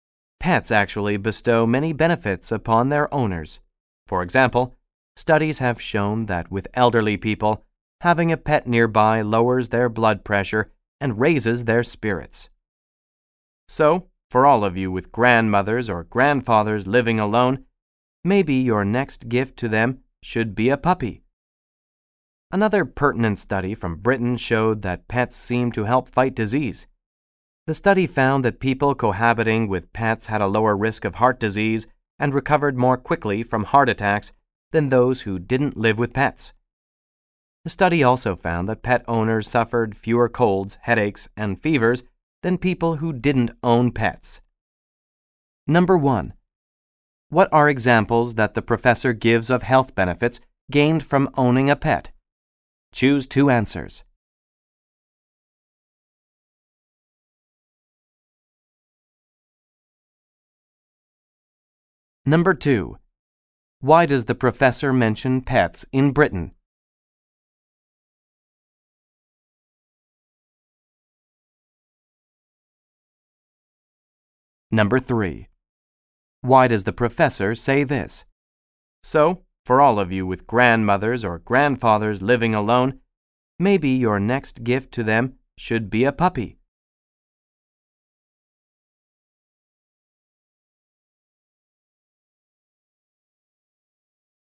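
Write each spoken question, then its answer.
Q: What are examples that the professor gives of health benefits gained from owning a pet?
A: Lower blood pressure and raised spirits in the elderly; lower risk of heart disease, faster heart-attack recovery, fewer colds, headaches and fevers

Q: Why does the professor mention pets in Britain?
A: To cite a study showing that pets seem to help fight disease

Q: Why does the professor say this?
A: To suggest that pets would be good for the health of elderly people living alone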